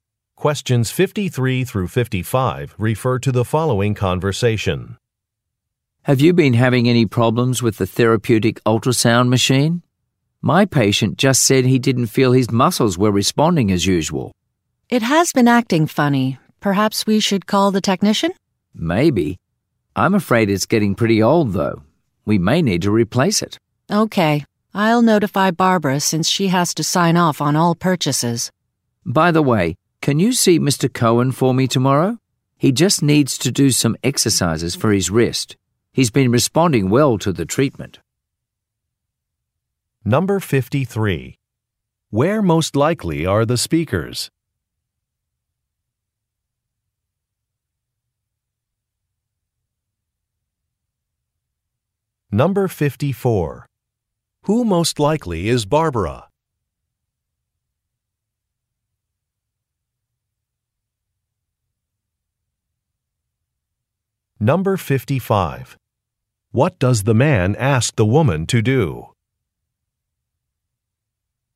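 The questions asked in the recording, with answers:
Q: Where most likely are the speakers?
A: At a physical therapy clinic

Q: Who most likely is Barbara?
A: The person who approves purchases (a manager)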